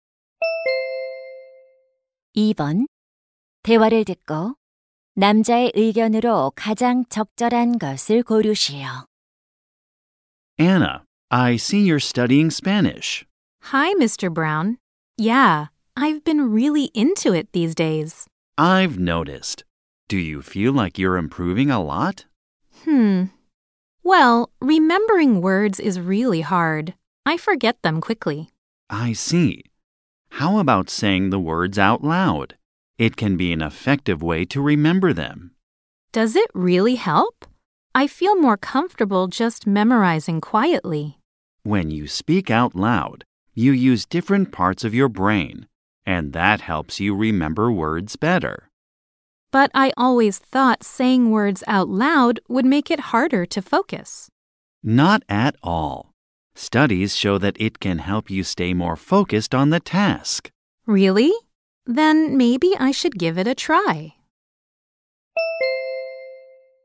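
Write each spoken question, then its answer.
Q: 대화를 듣고 남자의 의견으로 가장 적절한 것을 고르시오.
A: 단어를 소리 내어 말하면 암기에 도움이 된다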